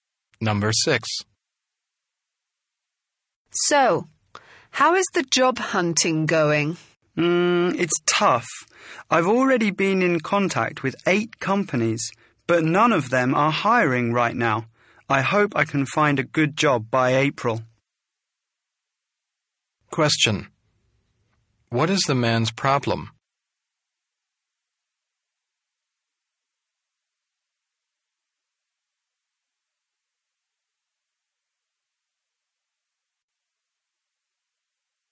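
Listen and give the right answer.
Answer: He can't find a job; no companies are hiring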